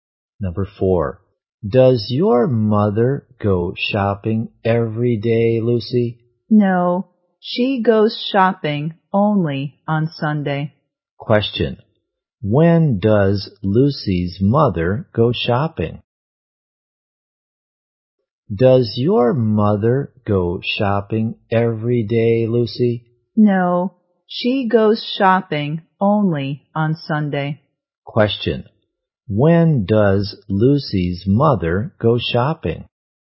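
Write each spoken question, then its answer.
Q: When does Lucy's mother go shopping?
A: Only on Sunday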